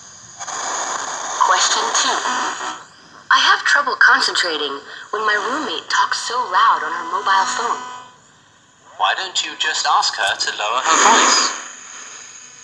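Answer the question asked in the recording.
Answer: Ask her roommate to lower her voice.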